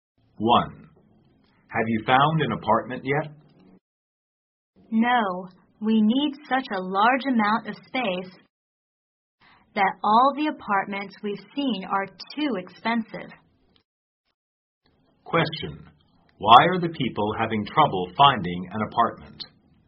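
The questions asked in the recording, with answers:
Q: Why are the people having trouble finding an apartment?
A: They need a lot of space, and the apartments they've seen are too expensive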